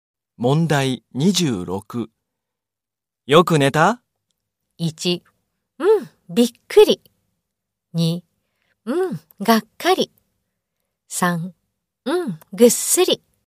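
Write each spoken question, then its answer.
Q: よく寝た?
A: 3: うん、ぐっすり。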